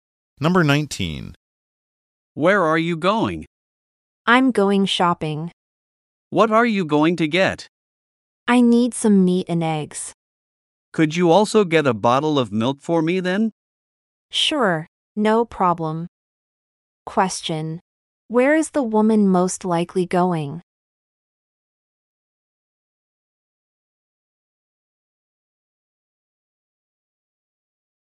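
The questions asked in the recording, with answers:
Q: Where is the woman most likely going?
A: To a store (grocery store or supermarket) to shop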